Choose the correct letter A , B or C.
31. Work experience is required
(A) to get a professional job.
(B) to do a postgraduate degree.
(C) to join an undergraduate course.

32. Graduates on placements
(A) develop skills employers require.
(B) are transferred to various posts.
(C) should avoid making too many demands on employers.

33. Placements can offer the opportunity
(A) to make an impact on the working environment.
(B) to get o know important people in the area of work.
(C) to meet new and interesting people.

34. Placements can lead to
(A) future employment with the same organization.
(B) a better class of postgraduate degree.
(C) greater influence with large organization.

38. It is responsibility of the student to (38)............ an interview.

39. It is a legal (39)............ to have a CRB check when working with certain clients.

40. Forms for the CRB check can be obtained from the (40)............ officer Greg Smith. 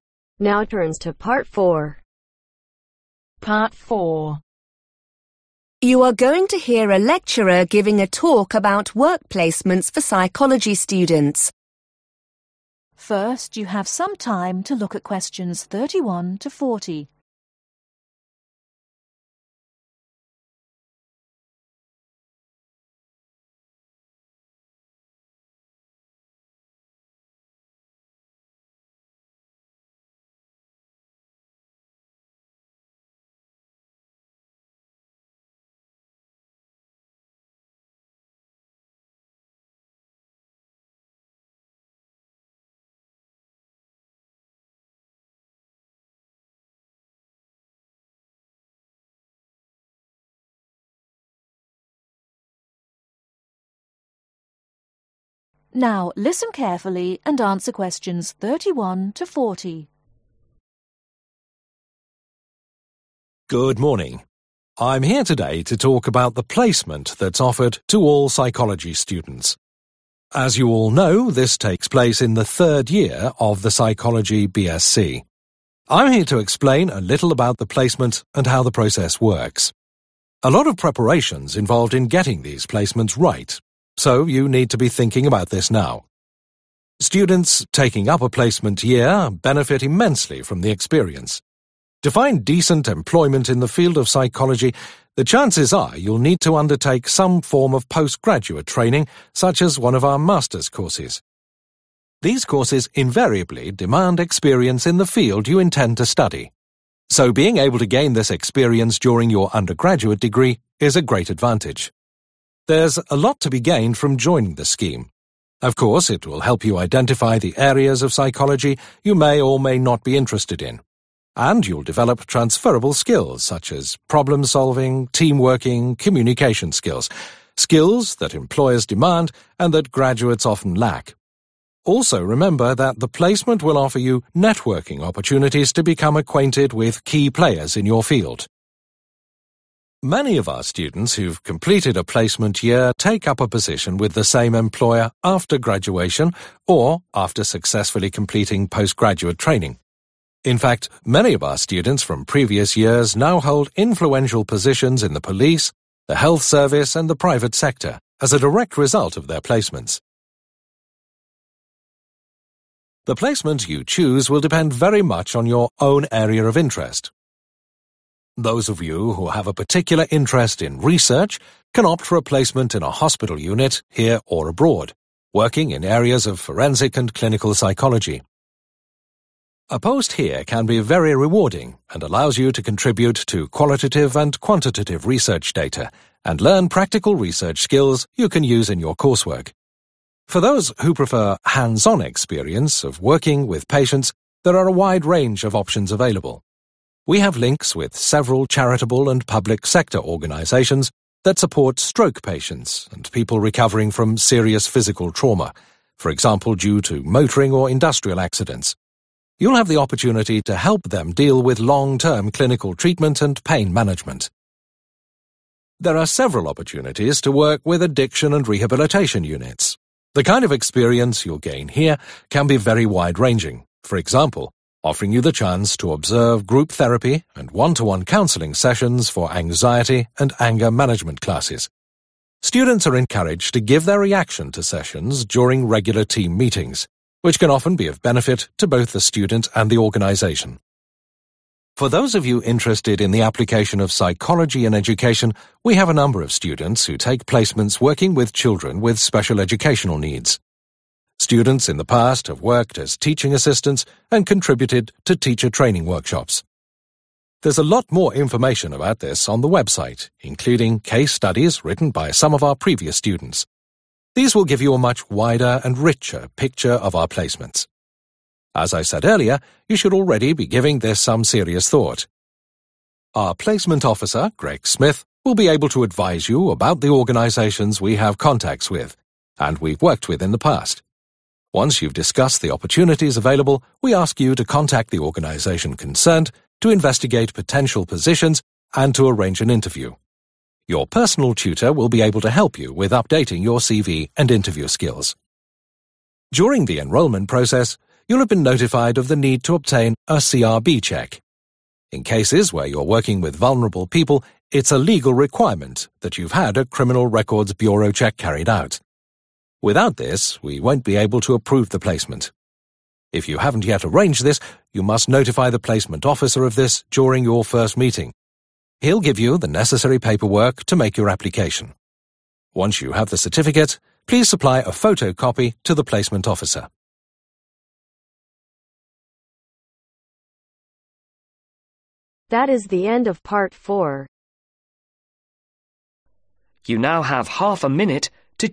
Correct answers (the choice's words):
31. to do a postgraduate degree.
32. develop skills employers require.
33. to get o know important people in the area of work.
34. future employment with the same organization.
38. Arrange
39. Requirement
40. Placement